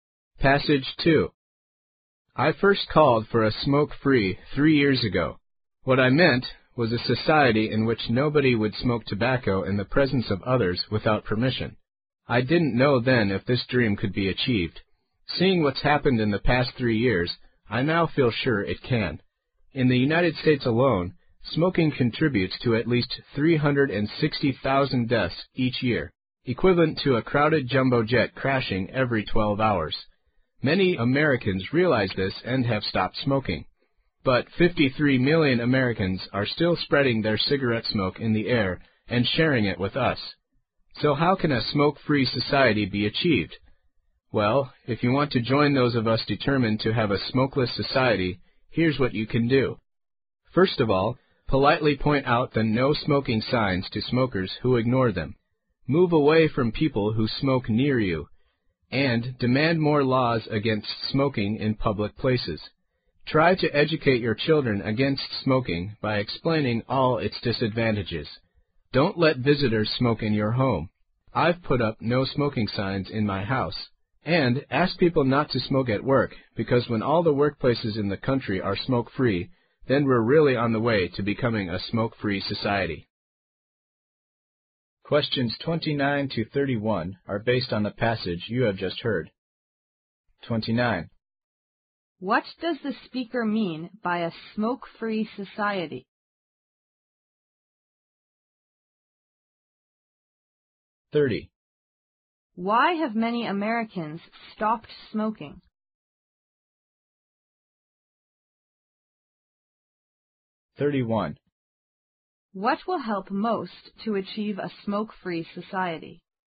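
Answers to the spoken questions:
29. A society where nobody smokes around others without their permission
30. They realize smoking causes many deaths
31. Making all workplaces smoke-free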